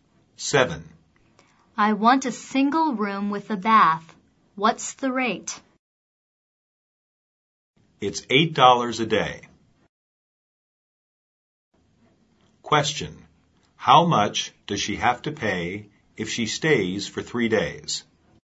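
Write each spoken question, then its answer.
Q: How much does she have to pay if she stays for 3 days?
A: $24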